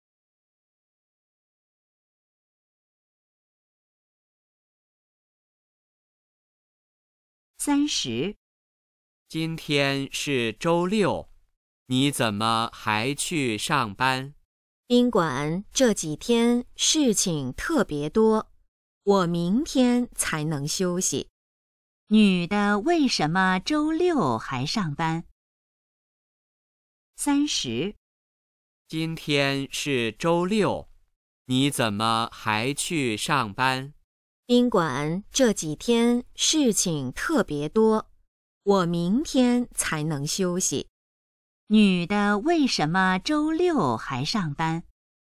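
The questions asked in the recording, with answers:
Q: 女的为什么周六还上班?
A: 宾馆这几天事情特别多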